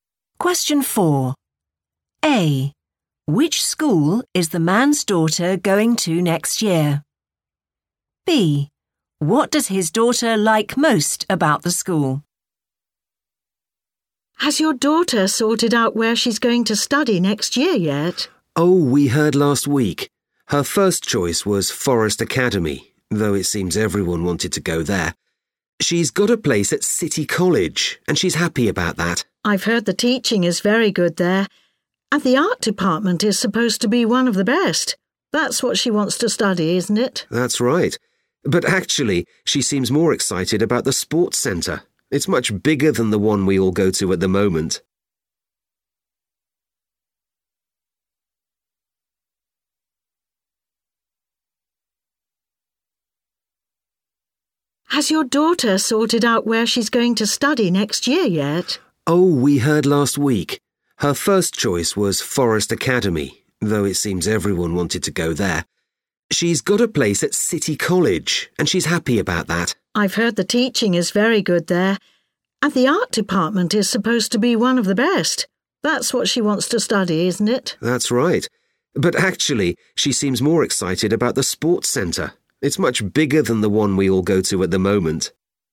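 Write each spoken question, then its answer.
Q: Which school is the man's daughter going to next year?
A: City College

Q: What does his daughter like most about the school?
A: the sports centre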